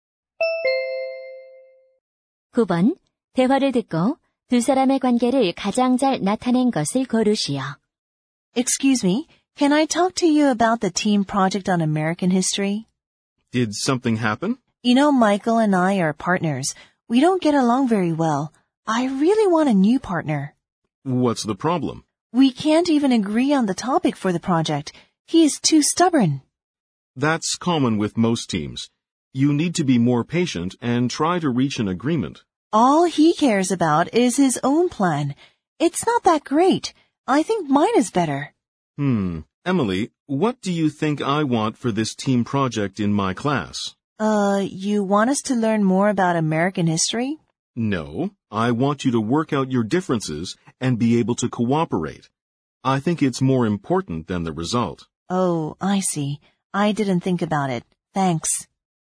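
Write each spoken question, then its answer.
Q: 대화를 듣고 두 사람의 관계를 가장 잘 나타낸 것을 고르시오.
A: 교사와 학생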